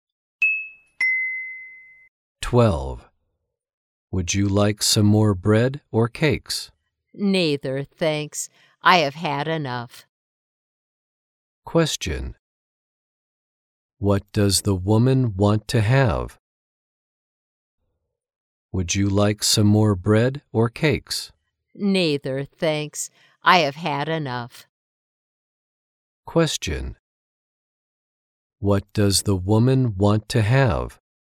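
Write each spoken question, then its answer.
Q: What does the woman want to have?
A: Nothing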